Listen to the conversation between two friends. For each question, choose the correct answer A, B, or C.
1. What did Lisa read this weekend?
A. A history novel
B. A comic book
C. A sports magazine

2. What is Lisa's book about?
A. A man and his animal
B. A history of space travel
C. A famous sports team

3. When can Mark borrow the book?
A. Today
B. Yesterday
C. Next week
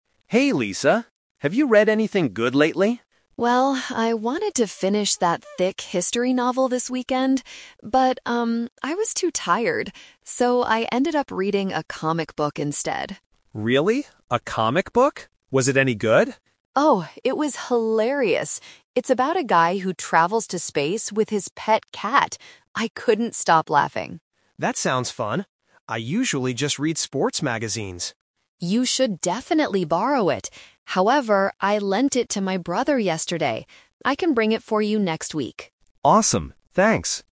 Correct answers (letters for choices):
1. B
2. A
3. C

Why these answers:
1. The correct answer is B because Lisa says, "I ended up reading a comic book instead." Option A is a trap; she wanted to read a history novel but was too tired. Option C is also a trap because sports magazines are what Mark usually reads, not Lisa.
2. The correct answer is A because Lisa describes the book as being "about a guy who travels to space with his pet cat" (a man and his animal). Option B is a trap that mixes the words "history" and "space" from different parts of the conversation. Option C is incorrect because "sports" was only mentioned by Mark regarding his magazines.
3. The correct answer is C. Lisa explicitly says, "I can bring it for you next week." Option A is incorrect because she doesn't have it right now. Option B is a trap because "yesterday" is when she lent the book to her brother, not when Mark can borrow it.

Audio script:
Mark: Hey, Lisa. Have you read anything good lately?
Lisa: Well, I wanted to finish that thick history novel this weekend. But, um, I was too tired. So, I ended up reading a comic book instead.
Mark: Really? A comic book? Was it any good?
Lisa: Oh, it was hilarious! It's about a guy who travels to space with his pet cat. I couldn't stop laughing.
Mark: That sounds fun. I usually just read sports magazines.
Lisa: You should definitely borrow it! However, I lent it to my brother yesterday. I can bring it for you next week.